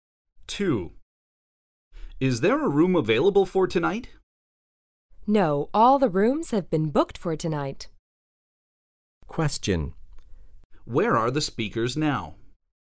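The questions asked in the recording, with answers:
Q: Where are the speakers now?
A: In a hotel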